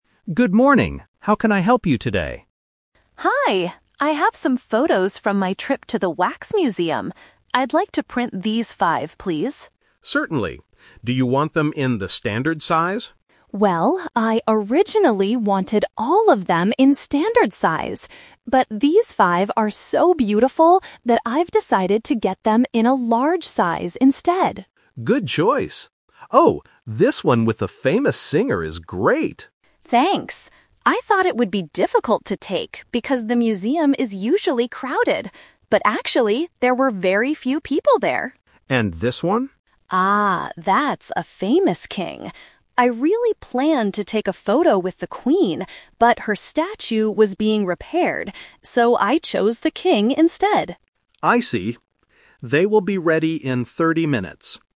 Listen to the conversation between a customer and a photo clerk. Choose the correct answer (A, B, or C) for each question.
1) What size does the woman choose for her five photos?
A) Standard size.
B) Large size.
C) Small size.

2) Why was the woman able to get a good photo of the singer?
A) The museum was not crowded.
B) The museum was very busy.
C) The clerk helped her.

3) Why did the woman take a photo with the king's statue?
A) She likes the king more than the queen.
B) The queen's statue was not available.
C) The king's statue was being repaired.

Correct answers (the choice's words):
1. Large size.
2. The museum was not crowded.
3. The queen's statue was not available.

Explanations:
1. The woman says, "But these five are so beautiful that I've decided to get them in a large size instead." Option A is the trap: she mentions "standard size" as her original plan, but she changed her mind.
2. She explains, "But actually, there were very few people there" (few people = not crowded). Option B is the trap: she mentions "crowded" as what she "thought" would happen, but it wasn't the reality.
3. The woman states she chose the king because the queen's statue "was being repaired" (not available to use). Option C is the trap: it was the queen's statue being repaired, not the king's.

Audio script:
Clerk: Good morning! How can I help you today?
Customer: Hi. I have some photos from my trip to the wax museum. I'd like to print these five, please.
Clerk: Certainly. Do you want them in the standard size?
Customer: Well, I originally wanted all of them in standard size. But these five are so beautiful that I've decided to get them in a large size instead.
Clerk: Good choice. Oh, this one with the famous singer is great!
Customer: Thanks! I thought it would be difficult to take because the museum is usually crowded. But actually, there were very few people there.
Clerk: And this one?
Customer: Ah, that's a famous king. I really planned to take a photo with the queen, but her statue was being repaired. So I chose the king instead.